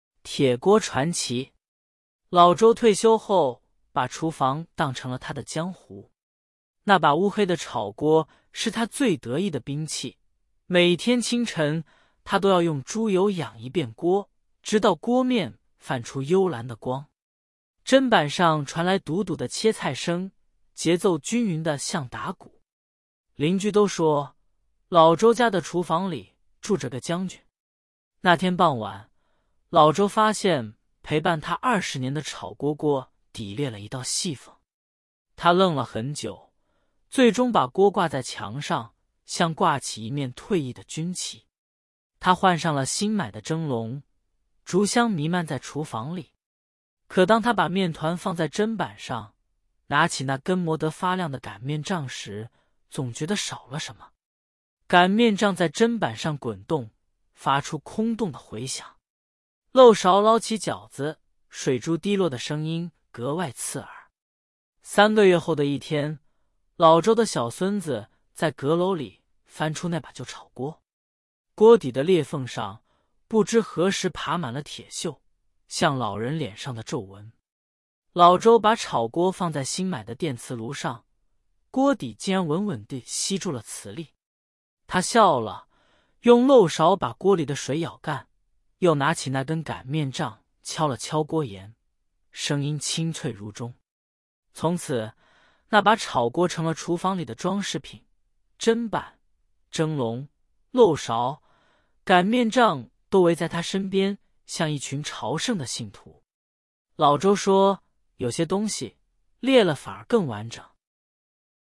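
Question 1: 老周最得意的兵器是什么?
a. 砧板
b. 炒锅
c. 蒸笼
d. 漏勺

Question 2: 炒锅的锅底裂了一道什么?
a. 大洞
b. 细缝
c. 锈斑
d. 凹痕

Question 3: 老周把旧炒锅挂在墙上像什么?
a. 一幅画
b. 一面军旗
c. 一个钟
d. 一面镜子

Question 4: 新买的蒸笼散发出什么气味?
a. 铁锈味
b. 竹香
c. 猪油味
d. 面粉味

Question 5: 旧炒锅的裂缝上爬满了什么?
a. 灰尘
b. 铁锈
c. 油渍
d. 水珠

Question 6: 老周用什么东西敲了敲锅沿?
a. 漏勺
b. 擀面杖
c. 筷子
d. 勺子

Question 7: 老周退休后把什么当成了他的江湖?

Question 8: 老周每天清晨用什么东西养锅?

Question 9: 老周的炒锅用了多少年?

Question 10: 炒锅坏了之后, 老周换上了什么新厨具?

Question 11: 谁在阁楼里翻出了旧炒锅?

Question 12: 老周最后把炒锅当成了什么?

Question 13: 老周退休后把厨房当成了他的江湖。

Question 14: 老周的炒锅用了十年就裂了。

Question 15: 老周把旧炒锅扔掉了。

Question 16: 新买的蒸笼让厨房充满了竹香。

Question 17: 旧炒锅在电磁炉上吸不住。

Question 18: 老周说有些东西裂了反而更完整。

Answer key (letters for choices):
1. b
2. b
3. b
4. b
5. b
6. b
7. 厨房
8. 猪油
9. 20年
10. 蒸笼
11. 老周的小孙子
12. 厨房里的装饰品
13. 对
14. 错
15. 错
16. 对
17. 错
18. 对

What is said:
那把乌黑的炒锅是他最得意的兵器,每天清晨,他都要用猪油养一遍锅,直到锅面泛出幽蓝的光。砧板上传来笃笃的切菜声,节奏均匀得像打鼓。邻居都说,老周家的厨房里住着个将军。
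那天傍晚,老周发现陪伴他二十年的炒锅锅底裂了一道细缝。他愣了很久,最终把锅挂在墙上,像挂起一面退役的军旗。他换上了新买的蒸笼,竹香弥漫在厨房里。可当他把面团放在砧板上,拿起那根磨得发亮的擀面杖时,总觉得少了什么。擀面杖在砧板上滚动,发出空洞的回响。漏勺捞起饺子,水珠滴落的声音格外刺耳。
三个月后的一天,老周的小孙子在阁楼里翻出那把旧炒锅。锅底的裂缝上,不知何时爬满了铁锈,像老人脸上的皱纹。老周把炒锅放在新买的电磁炉上,锅底竟然稳稳地吸住了磁力。他笑了,用漏勺把锅里的水舀干,又拿起那根擀面杖敲了敲锅沿,声音清脆如钟。从此,那把炒锅成了厨房里的装饰品,砧板、蒸笼、漏勺、擀面杖都围在它身边,像一群朝圣的信徒。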